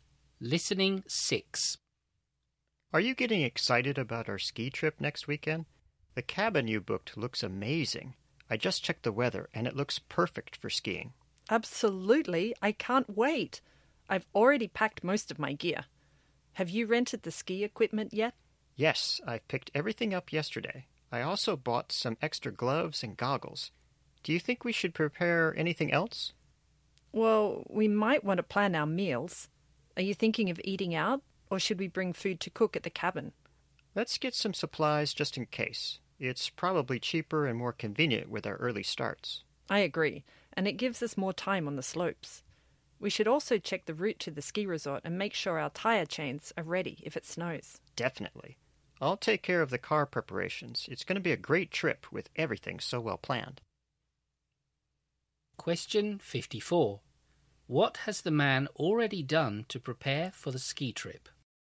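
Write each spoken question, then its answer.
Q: What has the man already done to prepare for the ski trip?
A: He picked up the rented ski equipment and bought extra gloves and goggles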